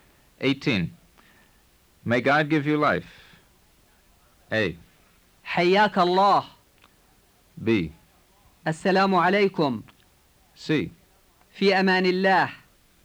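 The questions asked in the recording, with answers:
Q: May God give you life.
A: A: حياك الله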